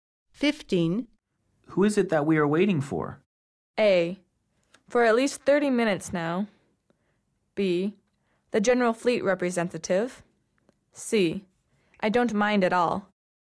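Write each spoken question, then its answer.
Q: Who is it that we are waiting for?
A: B: The General Fleet Representative.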